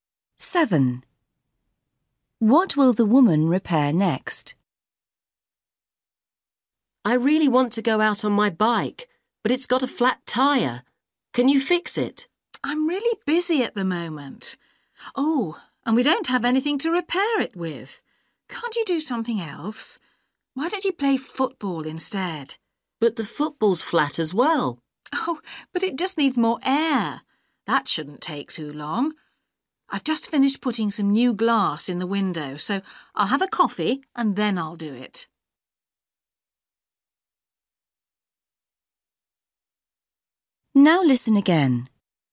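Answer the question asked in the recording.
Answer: The football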